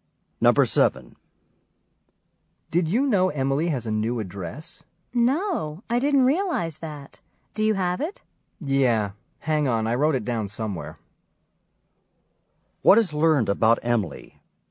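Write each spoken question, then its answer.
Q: What is learned about Emily?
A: She has a new address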